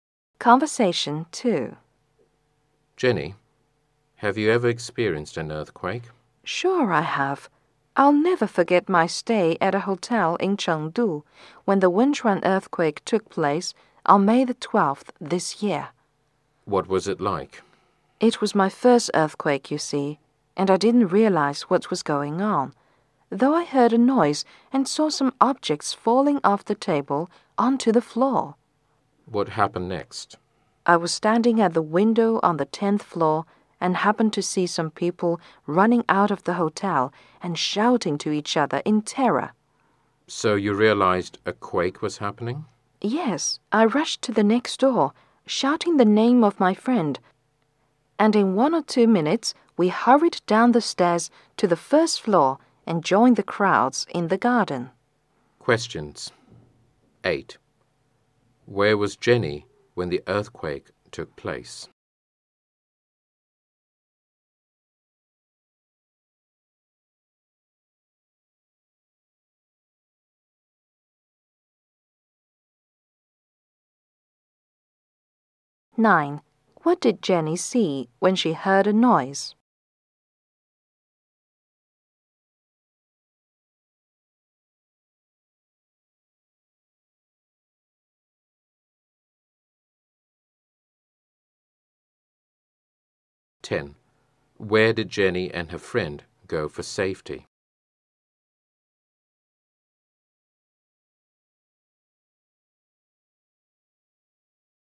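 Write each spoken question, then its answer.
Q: Where was Jenny when the earthquake took place?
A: At a hotel in Chengdu

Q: What did Jenny see when she heard a noise?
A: Objects falling off the table onto the floor

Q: Where did Jenny and her friend go for safety?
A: The garden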